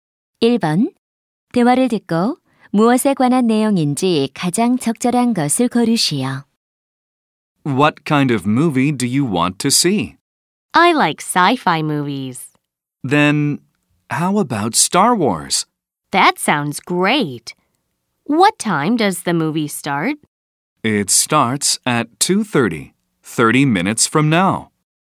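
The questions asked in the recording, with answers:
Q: 대화를 듣고 무엇에 관한 내용인지 가장 적절한 것을 고르시오.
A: 볼 영화 (영화 관람)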